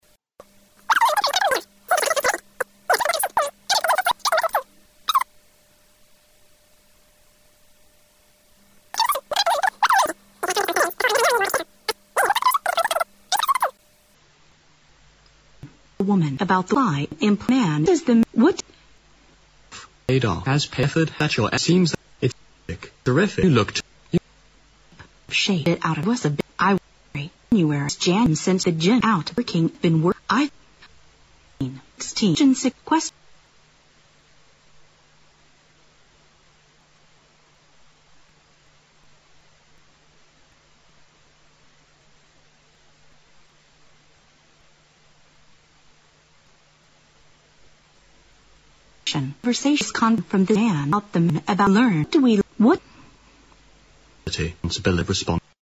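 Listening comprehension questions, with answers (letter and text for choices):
What does the man imply about the woman?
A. She must have paid a lot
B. She is known to have a terrific figure.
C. Her gym exercise has yielded good results.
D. Her effort to keep fit is really praiseworthy.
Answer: C. Her gym exercise has yielded good results.

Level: 大学英语四级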